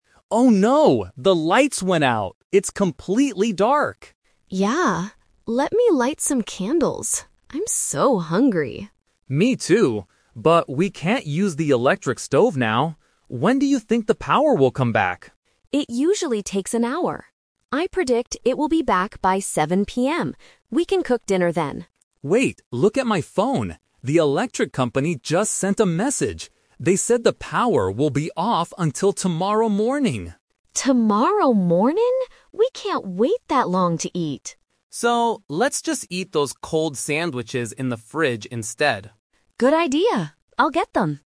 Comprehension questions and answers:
Listen to the conversation between two roommates. Choose the correct answer (A, B, or C).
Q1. What does Sam predict at first?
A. The power will be off until tomorrow.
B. The power will be back by 7:00 PM.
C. The power will take two hours to fix.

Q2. How does Alex know the real information about the power?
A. He calls the electric company.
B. He asks a neighbor outside.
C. He reads a message on his phone.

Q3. What do they decide to eat for dinner?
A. Cold sandwiches.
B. Food from a restaurant.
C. Hot food from the stove.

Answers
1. B. The power will be back by 7:00 PM.
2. C. He reads a message on his phone.
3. A. Cold sandwiches.

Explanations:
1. Sam clearly makes a prediction: "I predict it will be back by 7:00 PM." Trap: Option (A) is a trap because "tomorrow morning" is the actual time the power comes back, not Sam's first prediction. Option (C) is a "Number Trap" (Sam says an hour, not two).
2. Alex says, "Wait, look at my phone. The electric company just sent a message." Trap: Option (A) is a plausible action when the power goes out, but Alex doesn't call them; he gets a message. Option (B) is not mentioned in the audio.
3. Because they can't wait, Alex says, "let's just eat those cold sandwiches in the fridge instead." Trap: Option (C) is the classic A2 "Twist" trap. Cooking hot food on the stove was their original plan when they thought the power would come back at 7:00 PM. Option (B) is not mentioned.

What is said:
Alex: Oh no, the lights went out! It's completely dark.
Sam: Yeah. Let me light some candles. I'm so hungry.
Alex: Me too. But we can't use the electric stove now. When do you think the power will come back?
Sam: It usually takes an hour. I predict it will be back by 7:00 PM. We can cook dinner then.
Alex: Wait, look at my phone. The electric company just sent a message. They said the power will be off until tomorrow morning!
Sam: Tomorrow morning?! We can't wait that long to eat.
Alex: So, let's just eat those cold sandwiches in the fridge instead.

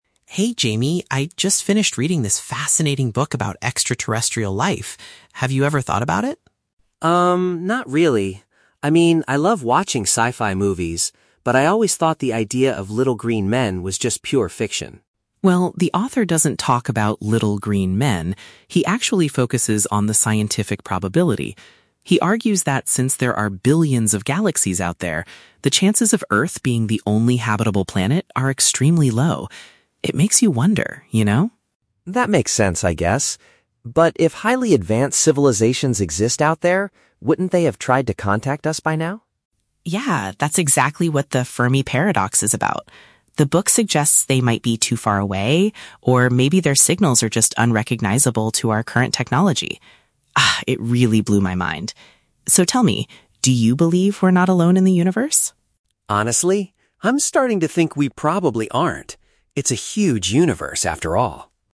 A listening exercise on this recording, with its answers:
Listen to the conversation between two roommates and choose the correct answer (A, B, or C) for each question.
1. What is the main subject of the book Chris is reading?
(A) A fictional story about an alien invasion.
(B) The biological evolution of green creatures on other planets.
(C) The scientific likelihood of life existing beyond Earth.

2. According to the book, why hasn't humanity received messages from aliens?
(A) Our scientific equipment might not be able to detect their communications.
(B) They do not possess the advanced technology needed to send signals.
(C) They are purposefully hiding from human telescopes to avoid contact.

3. How does Jamie's opinion change by the end of the conversation?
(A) He remains completely convinced that aliens are purely imaginary.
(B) He becomes open to the idea that other beings might exist in space.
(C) He is terrified by the possibility of encountering extraterrestrials.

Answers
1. (C) The scientific likelihood of life existing beyond Earth.
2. (A) Our scientific equipment might not be able to detect their communications.
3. (B) He becomes open to the idea that other beings might exist in space.

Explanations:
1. Chris says the author focuses on the "scientific probability" and the chances of Earth being the only "habitable planet" (which paraphrases to "likelihood of life existing beyond Earth"). Option (B) is The Trap: Jamie mentions "little green men," but Chris explicitly says the author doesn't talk about them. Option (A) is also a trap: Jamie mentions "sci-fi movies" and "fiction", but the book itself is a scientific discussion, not a fictional story.
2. Chris mentions that alien signals might be "unrecognizable to our current technology" (unrecognizable to technology = equipment unable to detect). Option (B) is The Trap: Jamie mentions "highly advanced civilizations," which implies they do have the technology, so the problem is not their lack of tech. Option (C) is plausible but is never mentioned in the audio.
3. When asked if he believes we are not alone, Jamie replies, "I'm starting to think we probably aren't." This shows he is now open to the idea. Option (A) is The Trap: This was his initial thought at the beginning of the conversation ("I always thought... was just pure fiction"), but his mind changed. Option (C) is not mentioned; he does not express fear or terror.

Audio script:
Chris: Hey Jamie, I just finished reading this fascinating book about extraterrestrial life. Have you ever thought about it?
Jamie: Um, not really. I mean, I love watching sci-fi movies, but I always thought the idea of little green men was just pure fiction.
Chris: Well, the author doesn't talk about little green men. He actually focuses on the scientific probability. He argues that since there are billions of galaxies out there, the chances of Earth being the only habitable planet are extremely low. It makes you wonder, you know?
Jamie: That makes sense, I guess. But if highly advanced civilizations exist out there, wouldn't they have tried to contact us by now?
Chris: Yeah, that's exactly what the "Fermi Paradox" is about. The book suggests they might be too far away, or maybe their signals are just unrecognizable to our current technology. Ah, it really blew my mind. So, tell me, do you believe we're not alone in the universe?
Jamie: Honestly? I'm starting to think we probably aren't. It's a huge universe, after all.

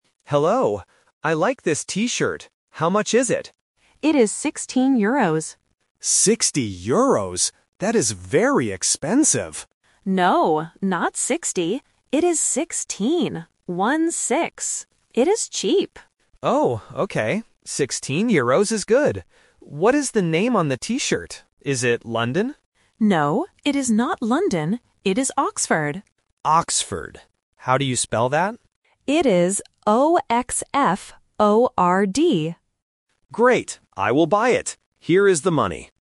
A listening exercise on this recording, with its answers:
Listen to the conversation in a souvenir shop and choose the correct answer (A, B, or C).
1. How much is the T-shirt?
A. 6 euros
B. 16 euros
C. 60 euros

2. What name is on the T-shirt?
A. London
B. Oxford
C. Cambridge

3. How does the shop assistant spell the name?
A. O-X-F-O-R-D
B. O-S-F-O-R-D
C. O-X-F-O-R-T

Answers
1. B. 16 euros
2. B. Oxford
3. A. O-X-F-O-R-D

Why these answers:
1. The shop assistant says the T-shirt is 16 euros. The tourist mishears it as "60 euros" (The Trap), but the assistant corrects him by saying "No, not 60. It is 16. One-six." This tests the student's ability to hear the difference between the "-teen" and "-ty" sounds. Option (A) is not mentioned.
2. The tourist asks "Is it London?" (The Trap). The shop assistant answers, "No, it is not London. It is Oxford." Students must catch the negative word "not" to reject option A. Option (C) is a plausible city name but is not mentioned.
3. The shop assistant spells the word clearly: O-X-F-O-R-D. Option (B) is a trap using the letter "S" instead of "X", and Option (C) uses "T" instead of "D" at the end, which are common listening mistakes for beginners.

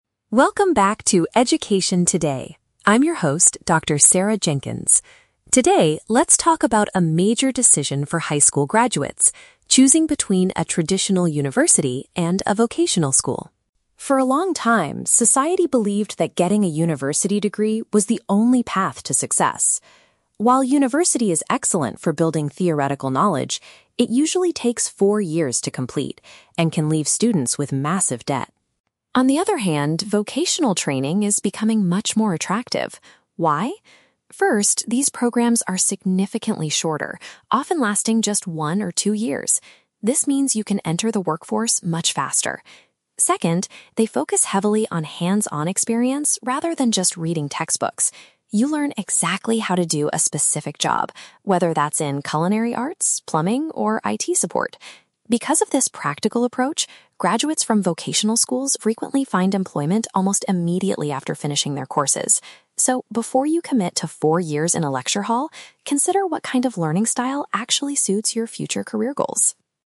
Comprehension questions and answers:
Listen to an education expert talking on a podcast and choose the correct answer (A, B, or C) for each question.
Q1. What is one of the main advantages of vocational programs mentioned by the expert?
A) They provide students with a deeper theoretical background.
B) They take much less time to complete than university degrees.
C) They are completely free and leave students with no debt.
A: B) They take much less time to complete than university degrees.

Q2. How do vocational schools differ from traditional universities in their teaching approach?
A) They prioritize practical skills over textbook learning.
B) They require students to attend classes in large lecture halls.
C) They only teach technology-related subjects like IT support.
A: A) They prioritize practical skills over textbook learning.

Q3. What frequently happens to students after they finish their vocational training?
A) They transfer to a traditional university to get a degree.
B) They struggle to pay back their massive student loans.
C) They get hired for a job very quickly.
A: C) They get hired for a job very quickly.

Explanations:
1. Dr. Jenkins states that vocational programs are "significantly shorter, often lasting just one or two years". Option B paraphrases this perfectly. The Trap: Option (A) is a trap using "Cross-matching"; "theoretical knowledge" is what traditional universities provide, not vocational schools. Option (C) uses the word "debt", but the audio says university causes debt; it never says vocational schools are completely free.
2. The expert explains that vocational schools "focus heavily on hands-on experience rather than just reading textbooks". Option A uses "practical skills" as a synonym for "hands-on experience". The Trap: Option (B) is a trap; "lecture hall" is mentioned at the very end as a characteristic of traditional universities. Option (C) mentions "IT support", but the audio lists it as just one of several examples (along with culinary arts and plumbing), so the word "only" makes this option incorrect.
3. The audio states that graduates from vocational schools "find employment almost immediately". Option C paraphrases this as "get hired for a job very quickly". The Trap: Option (A) is a plausible educational path but is not mentioned in the podcast. Option (B) is a trap; struggling to pay "massive debt" is mentioned as a negative point of going to a traditional university, not vocational training.

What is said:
Dr. Jenkins: Welcome back to "Education Today". I'm your host, Dr. Sarah Jenkins. Today, let's talk about a major decision for high school graduates: choosing between a traditional university and a vocational school.
For a long time, society believed that getting a university degree was the only path to success. While university is excellent for building theoretical knowledge, it usually takes four years to complete and can leave students with massive debt.
On the other hand, vocational training is becoming much more attractive. Why? First, these programs are significantly shorter, often lasting just one or two years. This means you can enter the workforce much faster. Second, they focus heavily on hands-on experience rather than just reading textbooks. You learn exactly how to do a specific job, whether that's in culinary arts, plumbing, or IT support. Because of this practical approach, graduates from vocational schools frequently find employment almost immediately after finishing their courses. So, before you commit to four years in a lecture hall, consider what kind of learning style actually suits your future career goals.

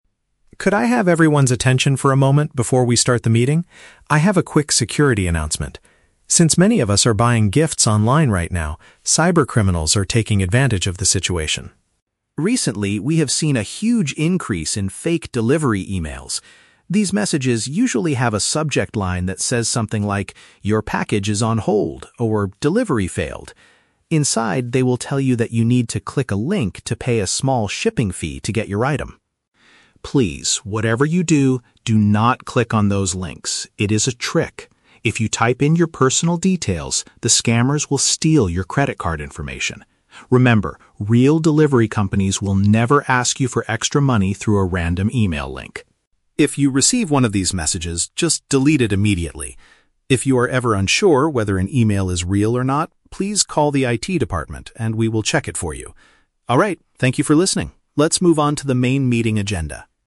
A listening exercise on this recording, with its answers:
Listen to an IT specialist making an announcement to the staff. Choose the best answer (A, B, or C) for each question.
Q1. What is the main purpose of the IT specialist's announcement?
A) To teach the staff how to buy cheap gifts on the internet.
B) To warn employees about a dangerous online trick.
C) To introduce a new computer software for the office.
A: B) To warn employees about a dangerous online trick.

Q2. How do the criminals try to deceive people in their emails?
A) They claim that a recent online purchase cannot be delivered yet.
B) They offer a free gift if the person completes a short online survey.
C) They pretend to be the company manager asking for a quick favor.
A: A) They claim that a recent online purchase cannot be delivered yet.

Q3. What should the staff members do if they get this type of message?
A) Forward the email to the local police department.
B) Pay the small fee using a safe bank transfer.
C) Remove the email from their inbox right away.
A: C) Remove the email from their inbox right away.

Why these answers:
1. The speaker says he has a "security announcement" about "cyber criminals" sending "fake delivery emails." Option B paraphrases this as warning employees about a "dangerous online trick."
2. The speaker explains that the email subject lines say "Your package is on hold" or "Delivery failed." Option A paraphrases this situation as claiming that a recent online purchase "cannot be delivered yet."
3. The speaker explicitly instructs the staff to "just delete it immediately" if they receive one of these messages. Option C paraphrases this perfectly as "Remove the email from their inbox right away."

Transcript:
IT Specialist: Could I have everyone's attention for a moment before we start the meeting? I have a quick security announcement. Since many of us are buying gifts online right now, cyber criminals are taking advantage of the situation.
Recently, we have seen a huge increase in fake delivery emails. These messages usually have a subject line that says something like, "Your package is on hold" or "Delivery failed." Inside, they will tell you that you need to click a link to pay a small shipping fee to get your item.
Please, whatever you do, do not click on those links. It is a trick. If you type in your personal details, the scammers will steal your credit card information. Remember, real delivery companies will never ask you for extra money through a random email link.
If you receive one of these messages, just delete it immediately. If you are ever unsure whether an email is real or not, please call the IT department, and we will check it for you. Alright, thank you for listening. Let's move on to the main meeting agenda.

